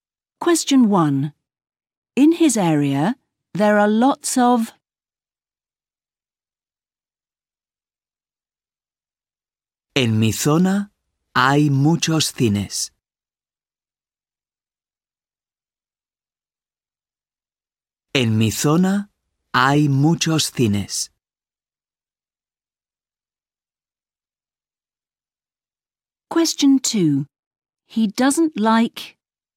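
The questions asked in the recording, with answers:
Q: In his area, there are lots of.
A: cinemas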